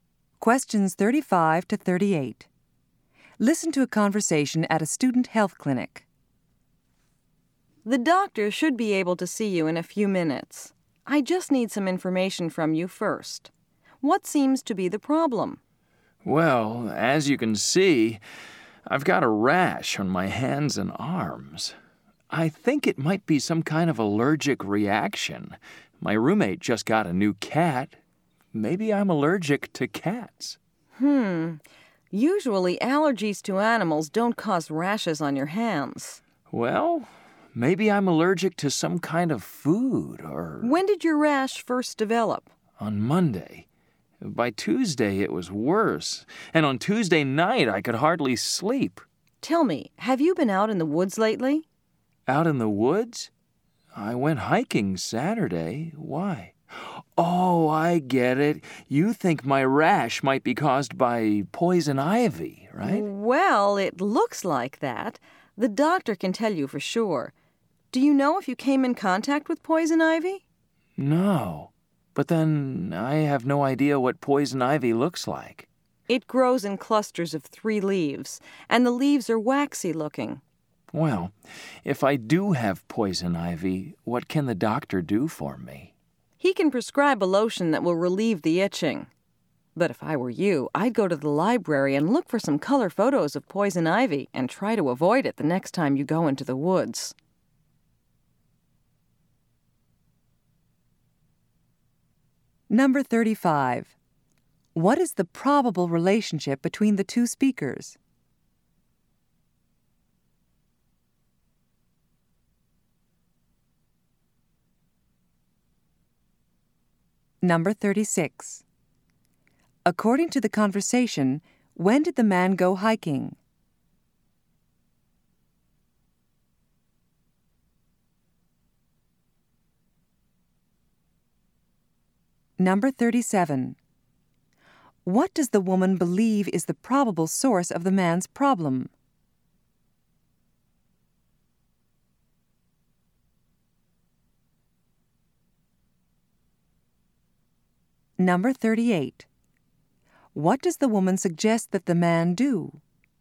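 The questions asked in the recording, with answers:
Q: What is the probable relationship between the two speakers?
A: Patient and clinic worker (nurse)

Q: According to the conversation, when did the man go hiking?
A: On Saturday

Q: What does the woman believe is the probable source of the man's problem?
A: Poison ivy

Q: What does the woman suggest that the man do?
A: Look at color photos of poison ivy in the library and avoid it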